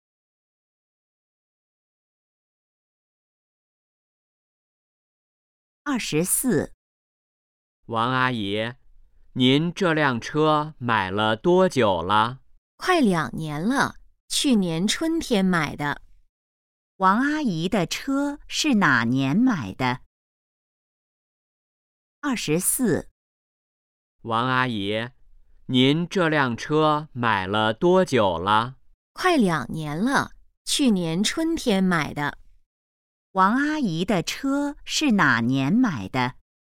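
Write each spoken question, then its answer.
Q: 王阿姨的车是哪年买的?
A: 去年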